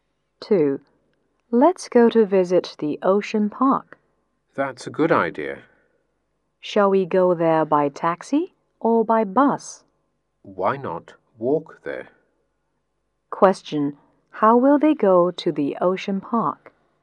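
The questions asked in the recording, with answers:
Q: How will they go to the Ocean Park?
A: On foot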